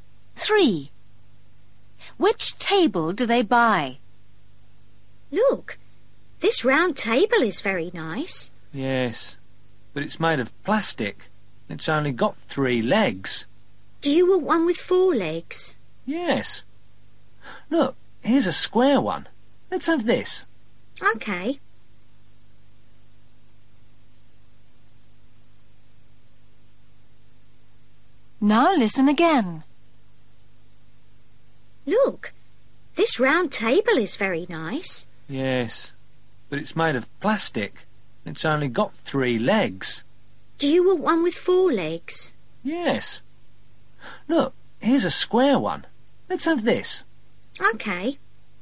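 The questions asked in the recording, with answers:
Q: Which table do they buy?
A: The square one with four legs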